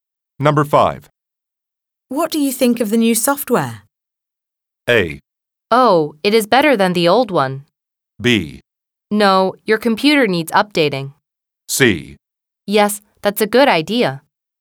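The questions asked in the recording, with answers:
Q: What do you think of the new software?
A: A: Oh, it is better than the old one.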